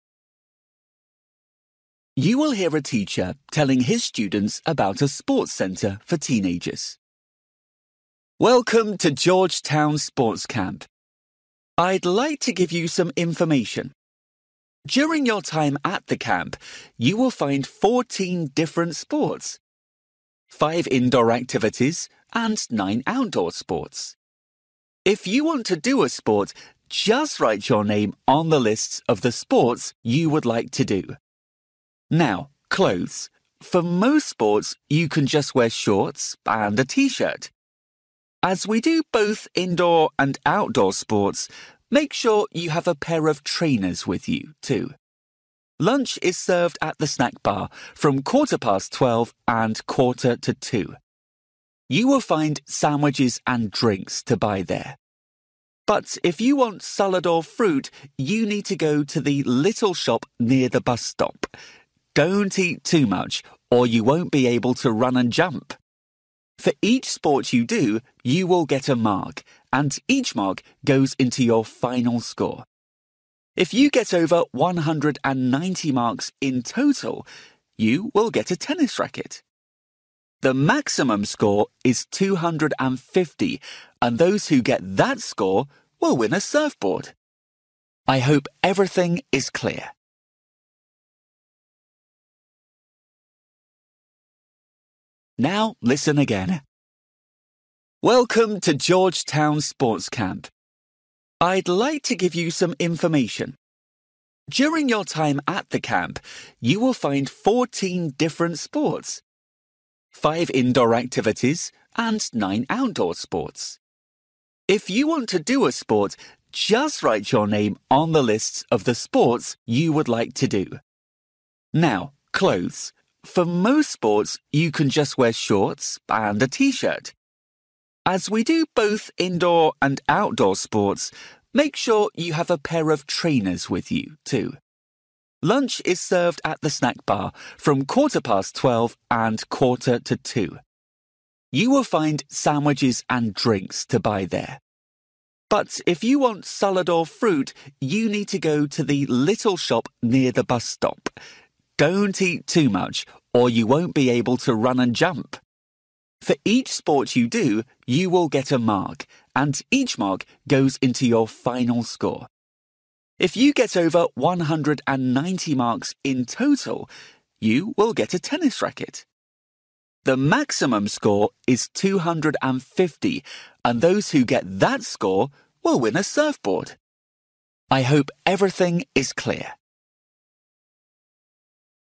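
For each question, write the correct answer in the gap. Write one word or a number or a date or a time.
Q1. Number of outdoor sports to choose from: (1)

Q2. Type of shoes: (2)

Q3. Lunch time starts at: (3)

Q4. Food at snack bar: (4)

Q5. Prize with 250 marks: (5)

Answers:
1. 9
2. trainers
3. 12:15
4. sandwiches
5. surfboard

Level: Luyện nghe trình độ A2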